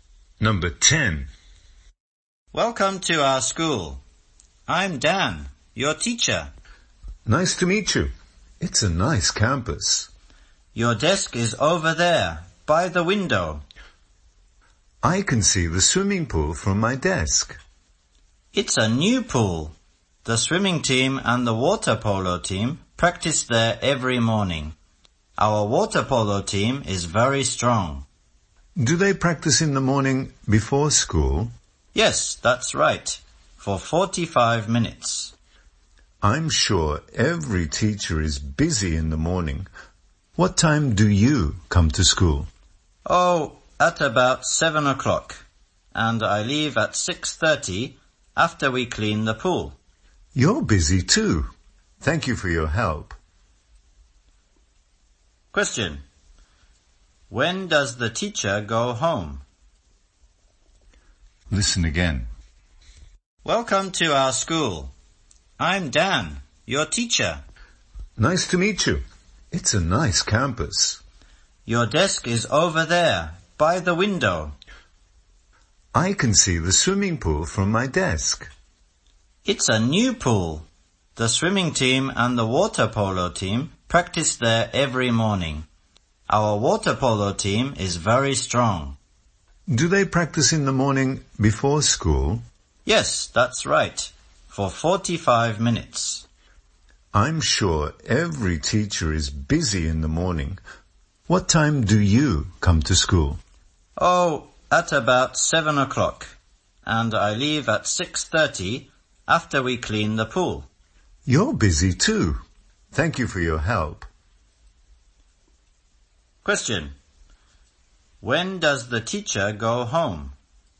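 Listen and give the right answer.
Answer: At 6:30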